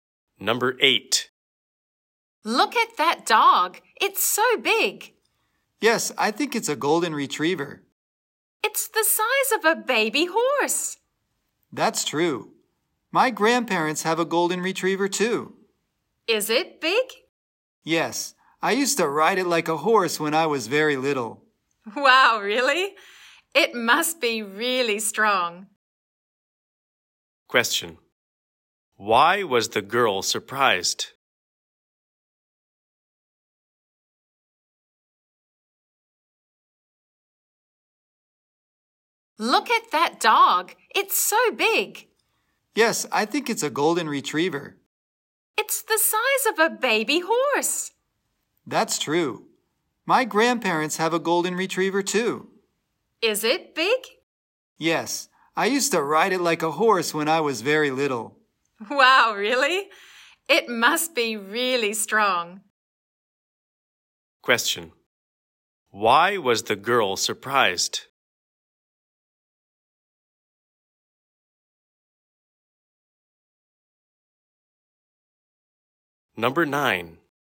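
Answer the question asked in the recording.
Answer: The boy used to ride his grandparents' dog like a horse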